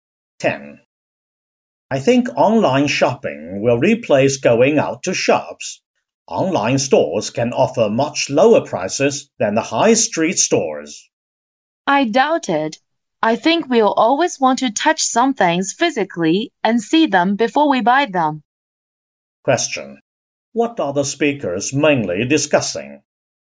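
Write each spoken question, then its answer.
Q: What are the speakers mainly discussing?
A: Whether online shopping will replace going to shops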